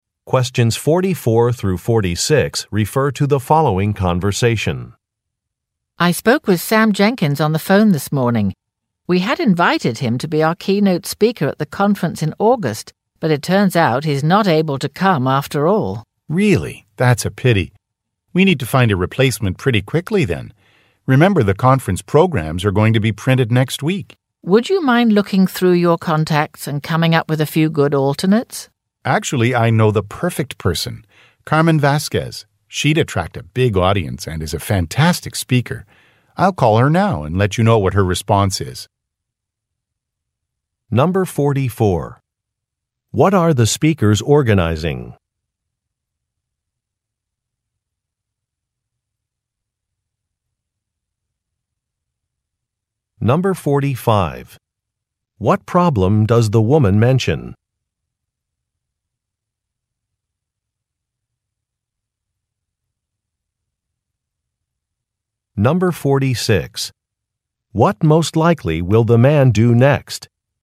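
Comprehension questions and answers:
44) What are the speakers organizing?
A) A television interview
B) A dinner party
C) A concert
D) A conference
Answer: D) A conference

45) What problem does the woman mention?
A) A speaker has canceled.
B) A venue has been closed.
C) A flight was delayed.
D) A delivery was not made.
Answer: A) A speaker has canceled.

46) What most likely will the man do next?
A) Send an e-mail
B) Prepare a presentation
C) Make a phone call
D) Buy some tickets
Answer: C) Make a phone call

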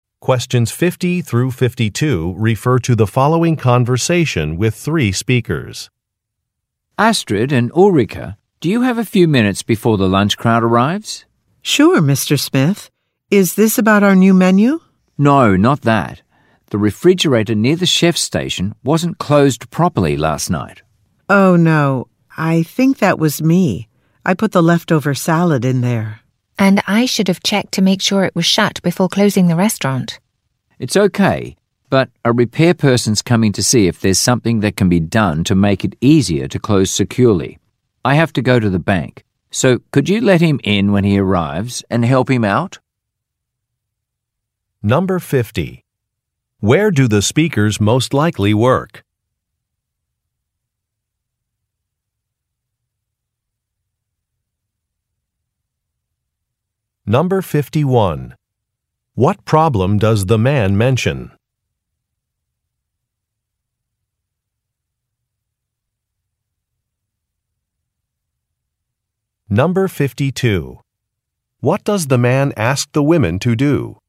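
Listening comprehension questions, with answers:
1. Where do the speakers most likely work?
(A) At a supermarket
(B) At a restaurant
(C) At a hardware store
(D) At a manufacturing plant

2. What problem does the man mention?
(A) The door of an appliance was left open.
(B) The sign outside the business is broken.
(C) A power cord cannot be located.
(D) A training session was not provided.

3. What does the man ask the women to do?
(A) Clean a work area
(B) Reschedule some shifts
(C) Assist a repair person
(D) Make a telephone call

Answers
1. (B) At a restaurant
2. (A) The door of an appliance was left open.
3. (C) Assist a repair person

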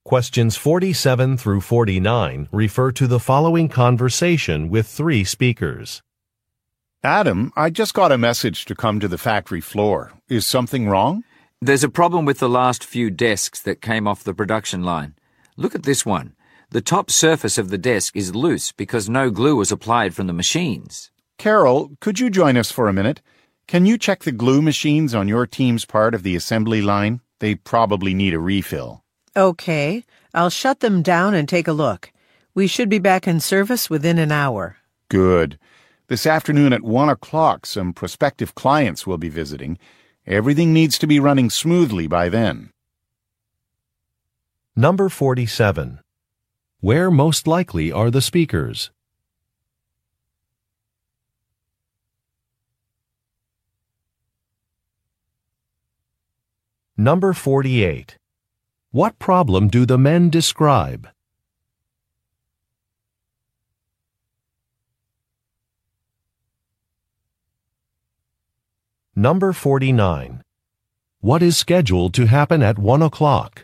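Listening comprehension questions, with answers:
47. Where most likely are the speakers?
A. At a print shop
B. At a furniture factory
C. At an appliance warehouse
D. At a stationery store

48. What problem do the men describe?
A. A door has been left open.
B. A delivery truck has been delayed.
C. Some employees are out sick.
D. Some products are defective.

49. What is scheduled to happen at one o'clock?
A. Some clients will visit.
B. Some equipment will be cleaned.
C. A training session will be conducted.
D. An employee luncheon will be held.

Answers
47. B. At a furniture factory
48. D. Some products are defective.
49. A. Some clients will visit.

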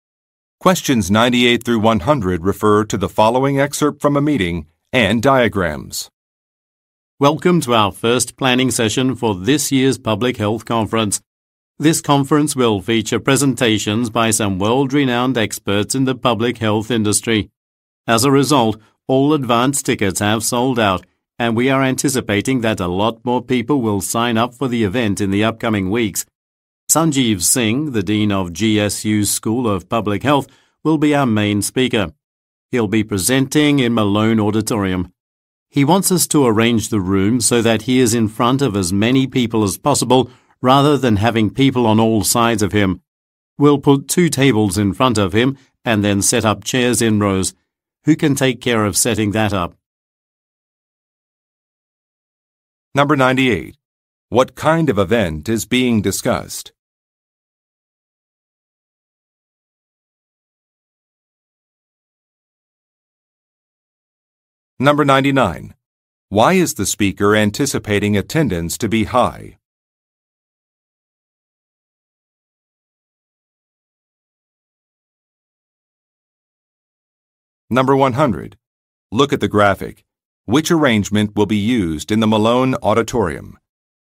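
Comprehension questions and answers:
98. What kind of event is being discussed?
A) A medical conference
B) A movie premiere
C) An anniversary celebration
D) An investors' meeting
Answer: A) A medical conference

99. Why is the speaker anticipating attendance to be high?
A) Many volunteers were recruited.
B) The venue is in a convenient location.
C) Some experts will be giving talks.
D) Some prizes will be distributed.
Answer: C) Some experts will be giving talks.

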